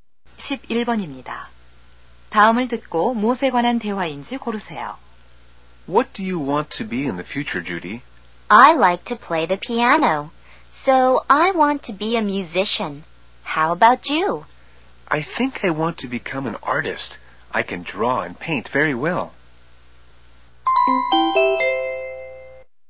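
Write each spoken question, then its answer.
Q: 다음을 듣고 무엇에 관한 대화인지 고르세요.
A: 장래 희망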